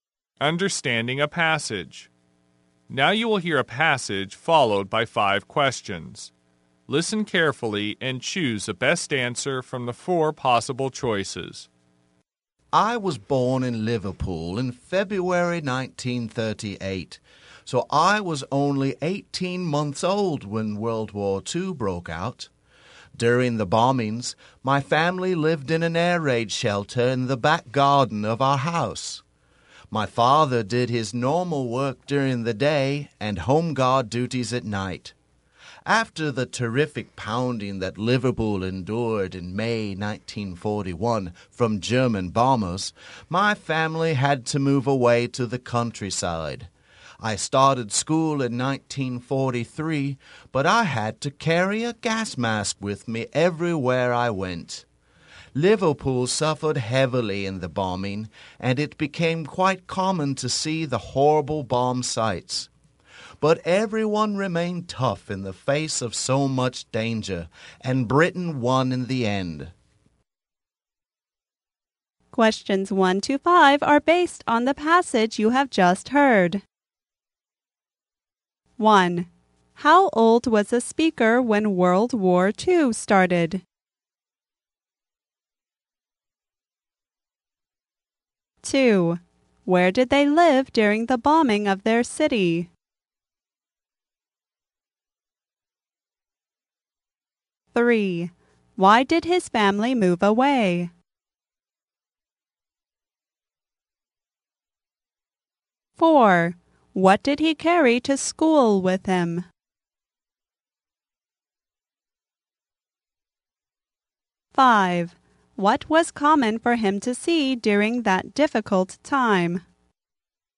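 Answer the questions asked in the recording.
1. 18 months old
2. In an air raid shelter in the back garden
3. Because of the heavy German bombing of Liverpool in May 1941
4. A gas mask
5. Bomb sites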